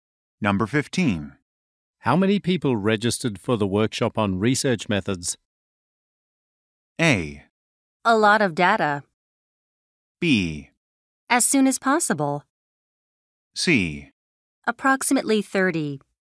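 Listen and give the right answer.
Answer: C: Approximately 30.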